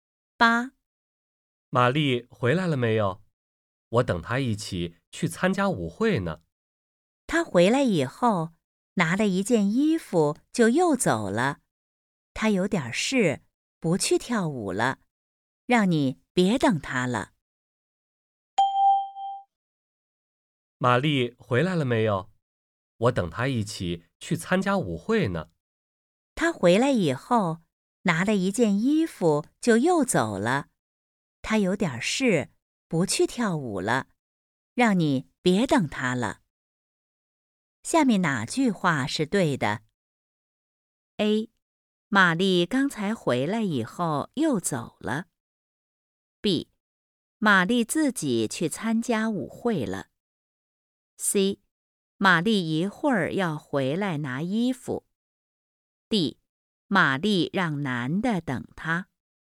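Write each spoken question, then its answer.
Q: 下面哪句话是对的?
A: A: 玛丽刚才回来以后又走了。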